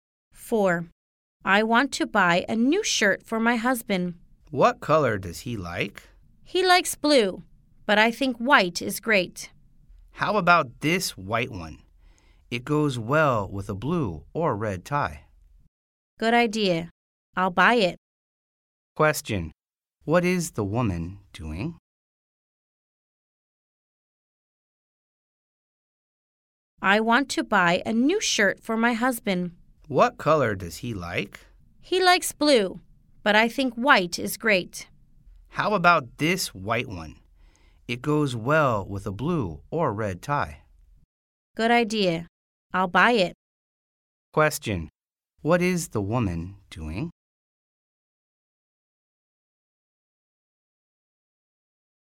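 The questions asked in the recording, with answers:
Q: Question. What is the woman doing?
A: Buying a shirt for her husband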